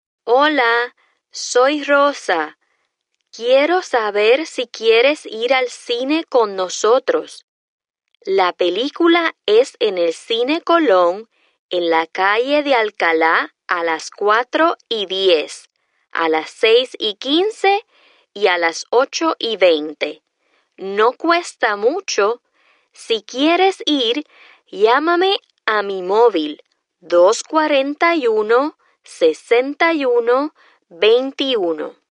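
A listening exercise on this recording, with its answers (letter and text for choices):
2. You call in to retrieve your voice mail and hear the following message from your friend Rosa.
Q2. What is the primary purpose of Rosa's message?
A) To tell you how much the movie costs.•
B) To give you her cell phone number.•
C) To invite you to the movies and inform you of movie times.•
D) To give you directions to the movie theater.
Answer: C) To invite you to the movies and inform you of movie times.•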